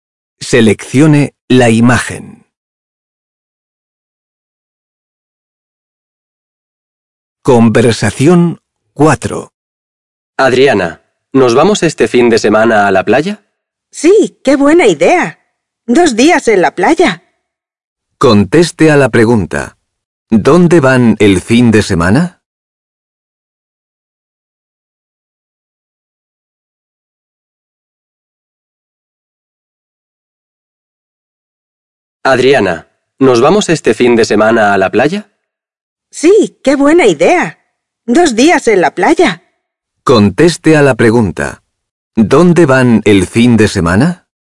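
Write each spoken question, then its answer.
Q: ¿Dónde van el fin de semana?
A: A la playa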